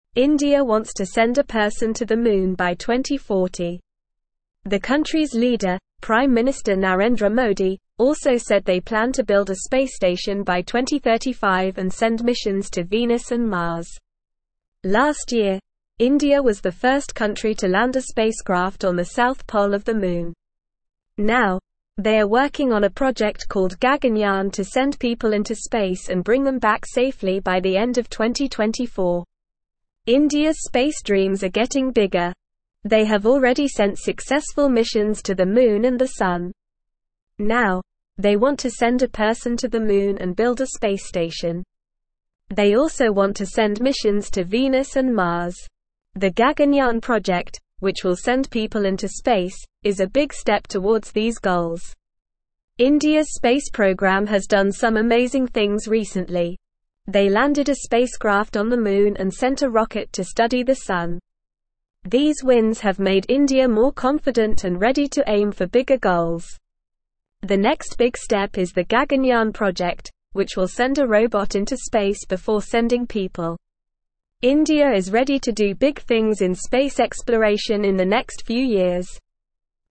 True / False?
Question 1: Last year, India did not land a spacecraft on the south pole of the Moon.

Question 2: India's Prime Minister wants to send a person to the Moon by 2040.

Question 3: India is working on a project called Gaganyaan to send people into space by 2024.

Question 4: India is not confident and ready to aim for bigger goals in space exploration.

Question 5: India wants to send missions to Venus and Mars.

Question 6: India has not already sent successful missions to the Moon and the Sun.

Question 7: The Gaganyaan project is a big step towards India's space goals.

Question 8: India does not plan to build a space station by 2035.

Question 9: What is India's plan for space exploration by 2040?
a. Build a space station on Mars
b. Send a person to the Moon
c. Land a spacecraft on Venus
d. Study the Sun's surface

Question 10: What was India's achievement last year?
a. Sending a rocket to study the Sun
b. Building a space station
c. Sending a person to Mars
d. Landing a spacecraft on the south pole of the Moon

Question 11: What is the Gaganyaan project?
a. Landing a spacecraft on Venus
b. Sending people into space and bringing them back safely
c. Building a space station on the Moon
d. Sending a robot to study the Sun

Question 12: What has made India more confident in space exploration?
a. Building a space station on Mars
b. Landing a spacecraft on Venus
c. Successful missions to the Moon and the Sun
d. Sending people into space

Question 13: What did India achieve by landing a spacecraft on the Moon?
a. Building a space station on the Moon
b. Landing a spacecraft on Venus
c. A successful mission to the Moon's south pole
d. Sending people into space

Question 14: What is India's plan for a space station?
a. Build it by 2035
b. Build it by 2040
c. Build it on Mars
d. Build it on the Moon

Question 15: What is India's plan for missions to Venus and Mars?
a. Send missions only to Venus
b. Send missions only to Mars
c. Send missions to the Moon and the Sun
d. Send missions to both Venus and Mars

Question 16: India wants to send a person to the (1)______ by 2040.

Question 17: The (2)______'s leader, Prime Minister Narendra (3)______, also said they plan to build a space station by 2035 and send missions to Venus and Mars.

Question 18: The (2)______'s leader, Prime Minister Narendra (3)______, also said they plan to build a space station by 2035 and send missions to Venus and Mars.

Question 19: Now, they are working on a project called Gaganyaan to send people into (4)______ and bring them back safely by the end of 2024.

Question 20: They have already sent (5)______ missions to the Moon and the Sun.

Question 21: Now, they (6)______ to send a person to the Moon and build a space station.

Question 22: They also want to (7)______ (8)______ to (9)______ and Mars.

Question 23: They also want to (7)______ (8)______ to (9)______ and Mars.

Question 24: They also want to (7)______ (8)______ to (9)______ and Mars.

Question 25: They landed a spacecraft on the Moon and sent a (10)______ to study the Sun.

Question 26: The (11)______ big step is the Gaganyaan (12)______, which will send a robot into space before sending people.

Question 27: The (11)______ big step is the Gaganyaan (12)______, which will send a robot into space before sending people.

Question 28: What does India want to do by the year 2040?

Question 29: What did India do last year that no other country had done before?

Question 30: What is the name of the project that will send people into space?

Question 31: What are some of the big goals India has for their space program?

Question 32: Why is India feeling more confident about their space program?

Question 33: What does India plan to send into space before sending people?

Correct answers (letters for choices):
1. False
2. True
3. True
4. False
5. True
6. False
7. True
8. False
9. b
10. d
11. b
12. c
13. c
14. a
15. d
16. Moon
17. country
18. Modi
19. space
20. successful
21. want
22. send
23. missions
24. Venus
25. rocket
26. next
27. project
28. India wants to send a person to the Moon by the year 2040.
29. India was the first country to land a spacecraft on the south pole of the Moon.
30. The project that will send people into space is called Gaganyaan.
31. Some of the big goals for India's space program are to build a space station, send missions to Venus and Mars, and send a person to the Moon.
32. India is feeling more confident about their space program because they have had successful missions to the Moon and the Sun, which have made them believe they can achieve bigger goals.
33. India plans to send a robot into space before sending people.

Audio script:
India wants to send a person to the Moon by 2040. The country's leader, Prime Minister Narendra Modi, also said they plan to build a space station by 2035 and send missions to Venus and Mars. Last year, India was the first country to land a spacecraft on the south pole of the Moon. Now, they are working on a project called Gaganyaan to send people into space and bring them back safely by the end of 2024.
India's space dreams are getting bigger. They have already sent successful missions to the Moon and the Sun. The Gaganyaan project, which will send people into space, is a big step towards these goals.
India's space program has done some amazing things recently. They landed a spacecraft on the Moon and sent a rocket to study the Sun. These wins have made India more confident and ready to aim for bigger goals. The next big step is the Gaganyaan project, which will send a robot into space before sending people. India is ready to do big things in space exploration in the next few years.

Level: Level 2